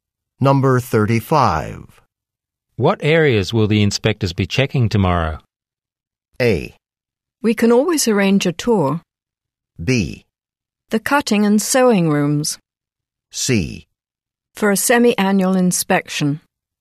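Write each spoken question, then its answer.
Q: What areas will the inspectors be checking tomorrow?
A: B: The cutting and sewing rooms.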